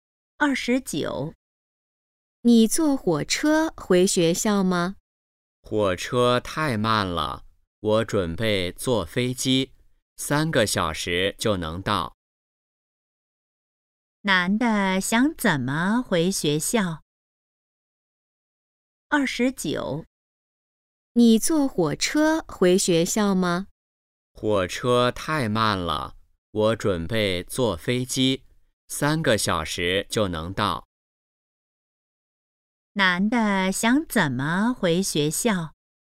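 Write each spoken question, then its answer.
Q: 男的想怎么回学校?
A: 坐飞机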